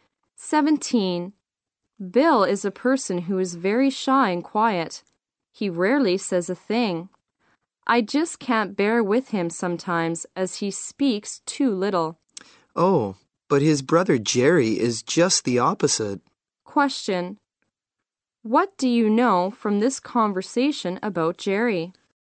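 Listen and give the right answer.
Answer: He is talkative and outgoing.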